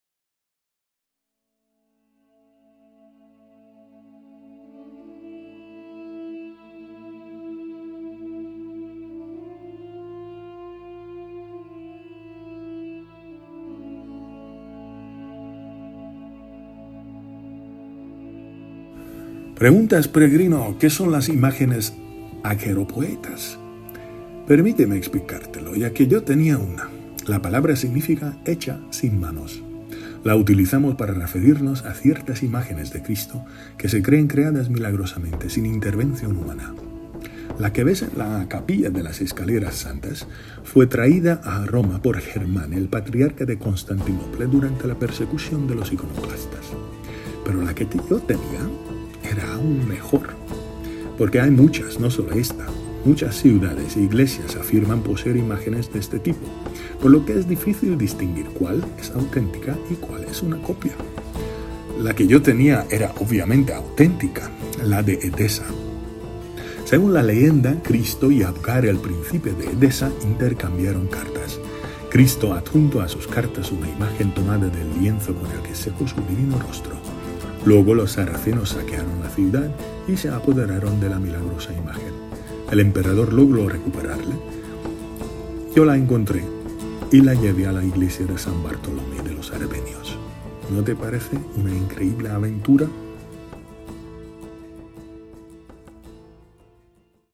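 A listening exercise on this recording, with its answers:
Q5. ¿Qué significa que algo es "aquiropoieta"?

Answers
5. Que está hecho sin manos, sin intervención humana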